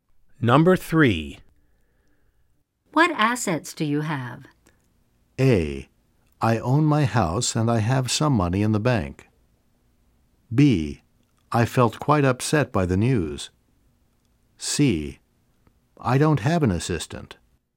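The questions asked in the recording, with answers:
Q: What assets do you have?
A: A: I own my house and I have some money in the bank.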